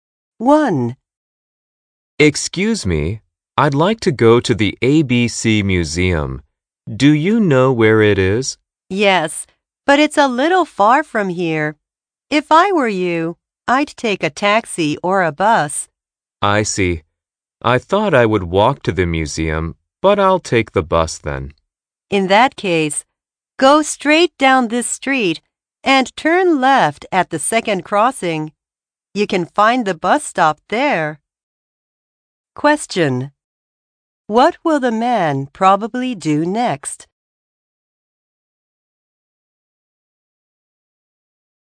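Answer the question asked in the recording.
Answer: Walk to the bus stop and take a bus to the museum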